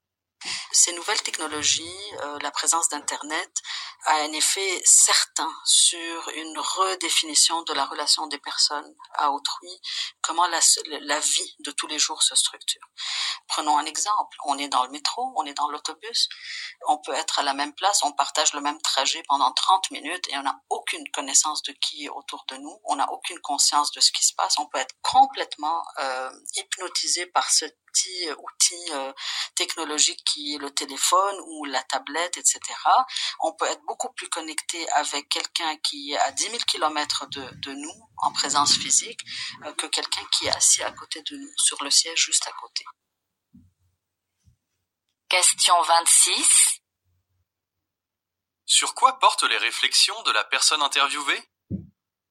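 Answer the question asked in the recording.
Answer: L'effet des nouvelles technologies sur nos relations aux autres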